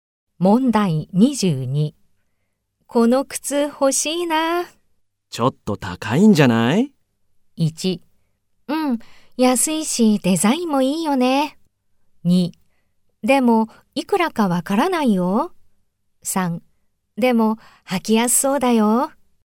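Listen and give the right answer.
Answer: 3: でも履きやすそうだよ。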